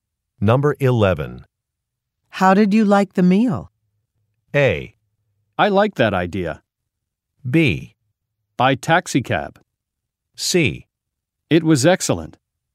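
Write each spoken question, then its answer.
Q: How did you like the meal?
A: C: It was excellent.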